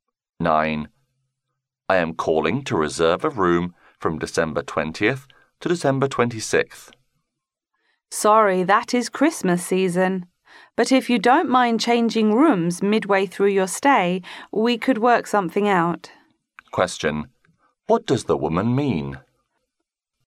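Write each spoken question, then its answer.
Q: What does the woman mean?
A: A room is possible if he changes rooms midway through his stay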